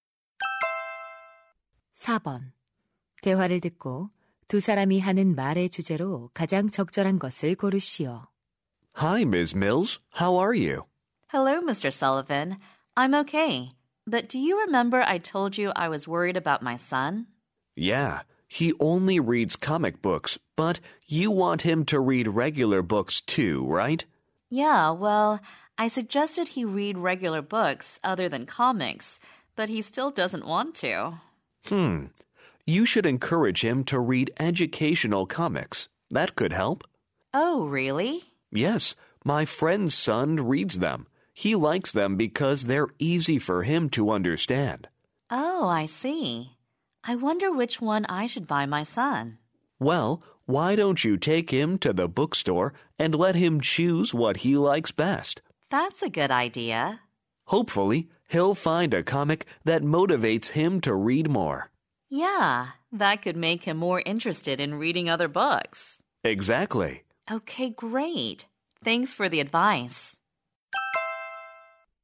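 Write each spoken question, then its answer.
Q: 대화를 듣고 두 사람이 하는 말의 주제로 가장 적절한 것을 고르시오.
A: 독서 흥미를 높이기 위한 학습 만화 활용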